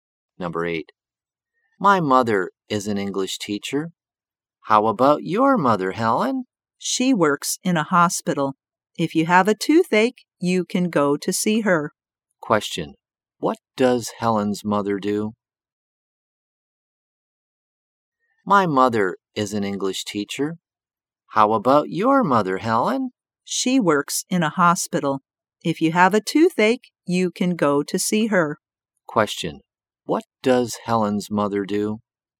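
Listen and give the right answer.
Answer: She is a dentist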